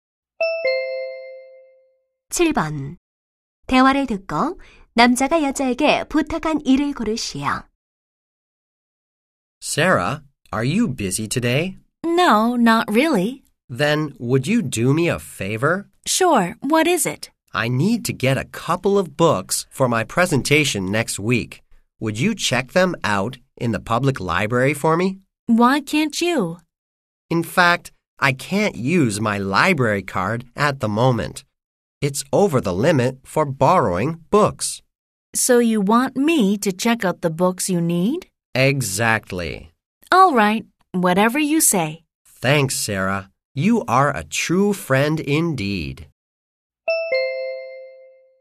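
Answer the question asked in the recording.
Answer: 도서관에서 책 대출하기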